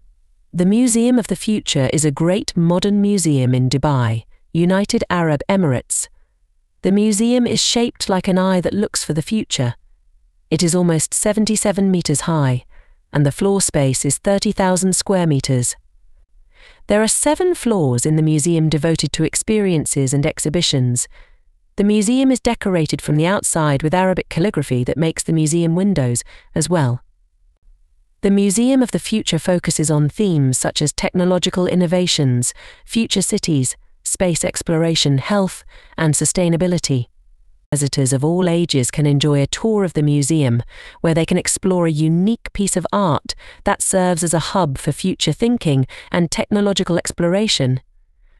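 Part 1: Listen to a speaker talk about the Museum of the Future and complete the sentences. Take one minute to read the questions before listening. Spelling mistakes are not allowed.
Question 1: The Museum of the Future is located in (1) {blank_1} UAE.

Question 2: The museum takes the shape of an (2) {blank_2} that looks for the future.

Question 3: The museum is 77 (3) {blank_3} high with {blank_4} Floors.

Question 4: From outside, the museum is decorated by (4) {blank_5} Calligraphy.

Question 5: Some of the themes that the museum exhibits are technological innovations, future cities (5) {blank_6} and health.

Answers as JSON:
{"1": "Dubai", "2": "eye", "3": "meters", "4": "Arabic", "5": "space exploration"}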